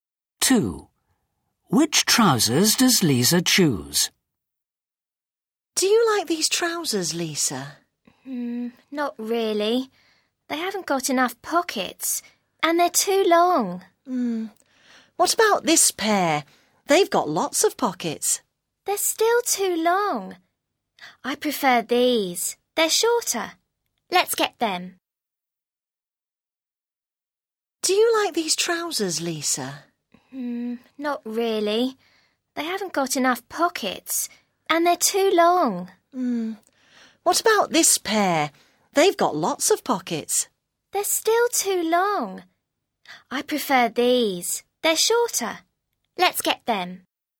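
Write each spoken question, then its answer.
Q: Which trousers does Lisa choose?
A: The shorter ones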